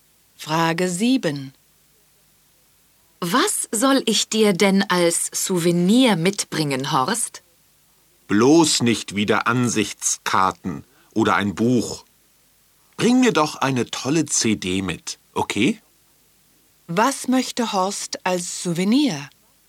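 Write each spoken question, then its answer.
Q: Was möchte Horst als Souvenir?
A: Eine CD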